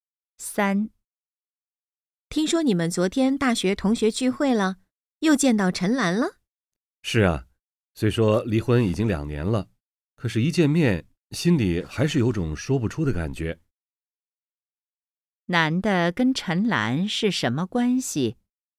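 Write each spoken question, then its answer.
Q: 男的跟陈兰是什么关系?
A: 前妻(离婚的夫妻)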